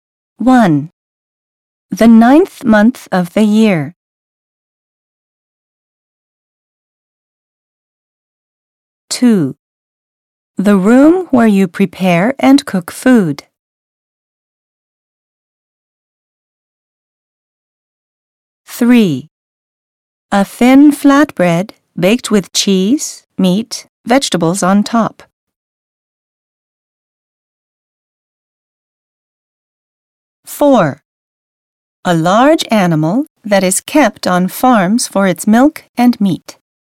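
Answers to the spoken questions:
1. September
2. kitchen
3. pizza
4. cow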